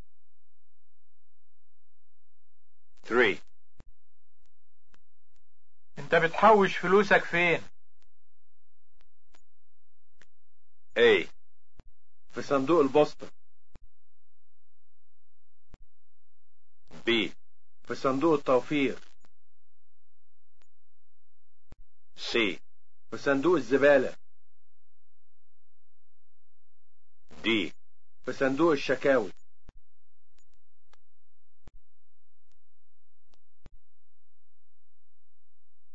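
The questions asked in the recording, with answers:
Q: انت بتحوش فلوسك فين؟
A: B: في صندوق التوفير.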